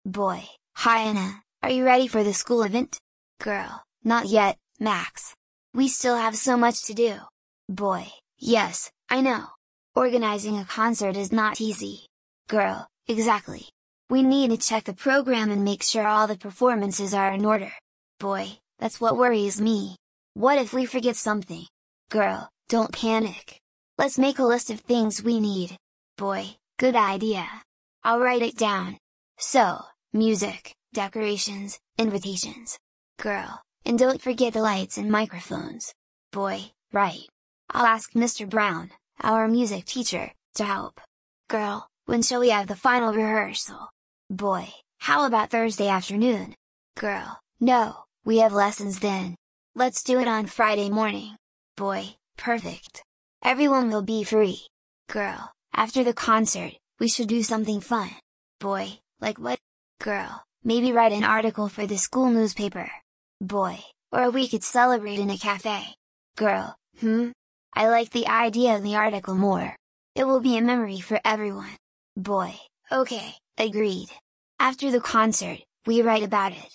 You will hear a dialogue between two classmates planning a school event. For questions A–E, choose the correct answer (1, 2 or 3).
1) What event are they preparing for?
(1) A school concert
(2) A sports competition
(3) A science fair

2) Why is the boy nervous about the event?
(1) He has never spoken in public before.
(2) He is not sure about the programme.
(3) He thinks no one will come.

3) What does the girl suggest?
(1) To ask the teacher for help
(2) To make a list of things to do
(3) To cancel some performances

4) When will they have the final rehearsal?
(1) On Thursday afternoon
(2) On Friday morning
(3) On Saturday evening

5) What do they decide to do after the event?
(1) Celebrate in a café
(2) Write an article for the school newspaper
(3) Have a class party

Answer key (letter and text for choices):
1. (1) A school concert
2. (2) He is not sure about the programme.
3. (2) To make a list of things to do
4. (2) On Friday morning
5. (2) Write an article for the school newspaper

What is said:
Boy: Hi Anna, are you ready for the school event?
Girl: Not yet, Max. We still have so much to do.
Boy: Yes, I know. Organising a concert is not easy.
Girl: Exactly. We need to check the programme and make sure all the performances are in order.
Boy: That's what worries me. What if we forget something?
Girl: Don't panic. Let's make a list of things we need.
Boy: Good idea. I'll write it down. So, music, decorations, invitations...
Girl: And don't forget the lights and microphones.
Boy: Right. I'll ask Mr Brown, our music teacher, to help.
Girl: When shall we have the final rehearsal?
Boy: How about Thursday afternoon?
Girl: No, we have lessons then. Let's do it on Friday morning.
Boy: Perfect. Everyone will be free.
Girl: After the concert, we should do something fun.
Boy: Like what?
Girl: Maybe write an article for the school newspaper?
Boy: Or we could celebrate in a café.
Girl: Hmm, I like the idea of the article more. It will be a memory for everyone.
Boy: Okay, agreed. After the concert, we write about it.